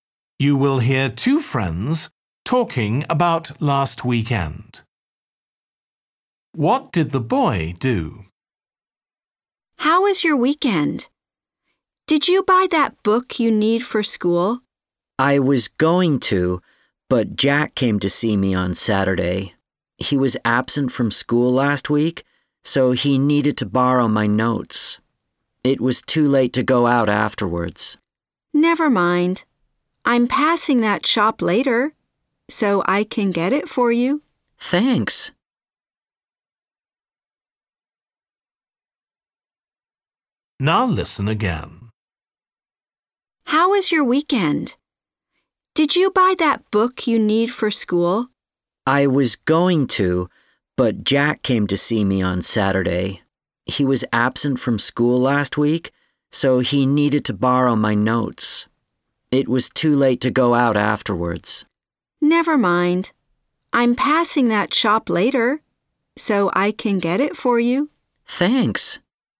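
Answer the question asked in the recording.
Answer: He lent his school notes to Jack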